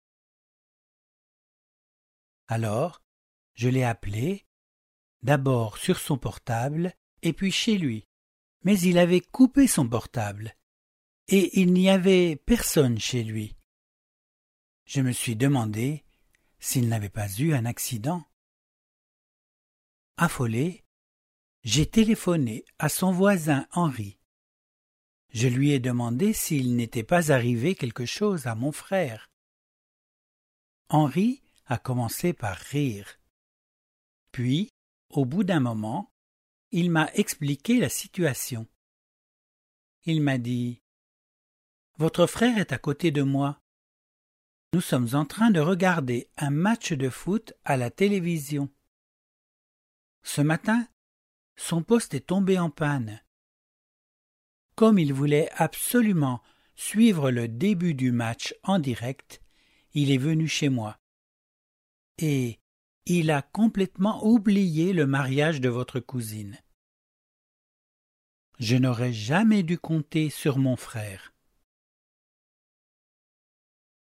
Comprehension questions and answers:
話の内容に合致している場合は 1を 一致しない場合は 2を記入してください。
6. Comme Antoinette était inquiète, elle a appelé le voisin de son frère.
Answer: 1

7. Gérard était en train de regarder un match de foot quand Henri a reçu le coup de fil d'Antoinette.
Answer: 1

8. Le poste de télévision de Gérard est tombé en panne samedi matin.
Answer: 1

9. Selon Henri, Gérard a préféré suivre en direct le match plutôt que de se rendre au mariage.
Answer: 2

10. Antoinette regrette d'avoir compté sur son frère.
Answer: 1

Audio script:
Alors, je l'ai appelé, d'abord sur son portable et puis chez lui. Mais il avait coupé son portable et il n'y avait personne chez lui. Je me suis demandé s'il n'avait pas eu un accident.
Affolée, j'ai téléphoné à son voisin Henri. Je lui ai demandé s'il n'était pas arrivé quelque chose à mon frère. Henri a commencé à rire. Puis au bout d'un moment, il m'a expliqué la situation. Il m'a dit : « Votre frère est à côté de moi. Nous sommes en train de regarder un match de foot à la télévision. Ce matin, son poste est tombé en panne. Comme il voulait absolument suivre le début du match en direct, il est venu chez moi. Et il a complètement oublié le mariage de votre cousine. » Je n'aurais jamais dû compter sur son frère.